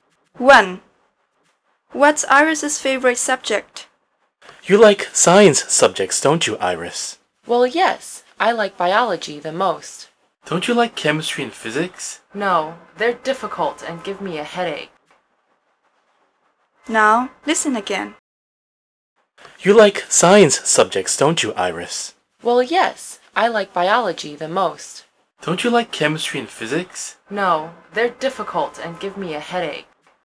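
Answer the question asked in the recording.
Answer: Biology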